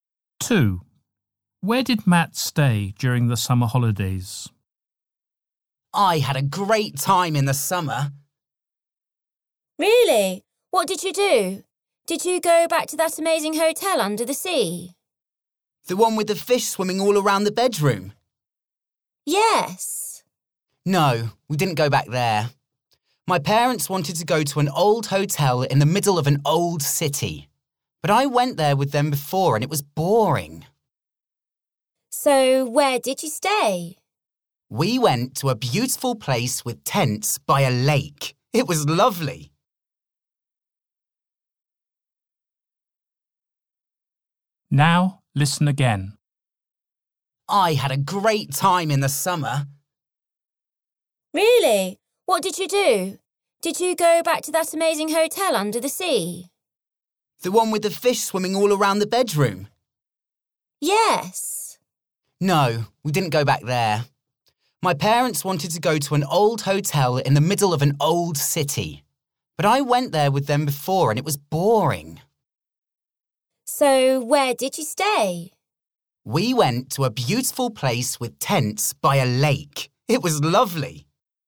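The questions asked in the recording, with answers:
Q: Where did Matt stay during the summer holidays?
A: In a tent by a lake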